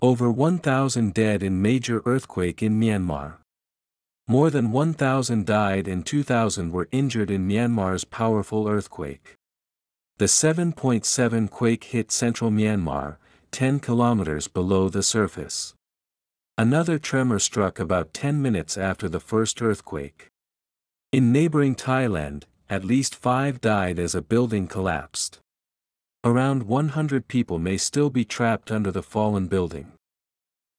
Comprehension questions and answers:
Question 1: More than 1,000 died and 2,000 ( ).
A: were injured in Myanmar's powerful earthquake

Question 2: The 7.7 quake hit central Myanmar, 10 ( ).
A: kilometers below the surface

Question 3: Another tremor struck about 10 ( ).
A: minutes after the first earthquake

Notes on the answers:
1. 主な不正解事例) ▶「Myanmar's」を「Myanmar」と書いてしまった。 ⇒ 「Myanmar's(ミャンマーの)」と所有格にしないと、文法的に「powerful earthquake(巨大な地震)」につながりません。語尾の[z]の発音に注意しましょう。
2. 主な不正解事例) ▶ 「kilometers」を「kilometer」と単数形で書いてしまった。 ⇒ 直前に10という数字があるので、「10 kilometers」と複数形にするのが文法的に正しいです。語尾の発音[z]に注意してください。 ※ただし、この設問はほとんどの方が正解でした!
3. 主な不正解事例) ▶ 「minutes」 や「first」 との綴りを正しく書けなかった。 ⇒ この設問はほとんどの人が正解でした。間違えた人は、基礎的な語彙力か集中力が欠けている可能性が高いです。

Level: 中級脱出